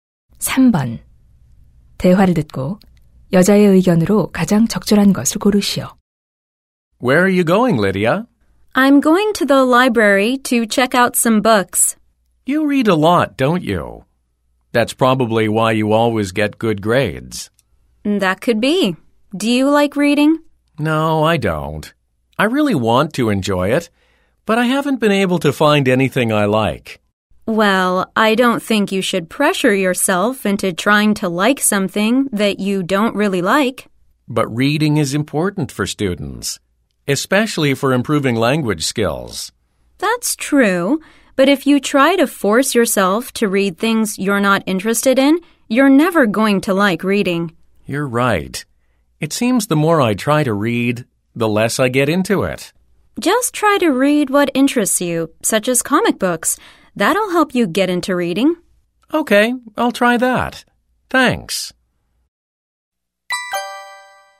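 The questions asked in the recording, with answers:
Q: 대화를 듣고 여자의 의견으로 가장 적절한 것을 고르시오.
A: 억지로 읽지 말고 흥미 있는 책부터 읽어라.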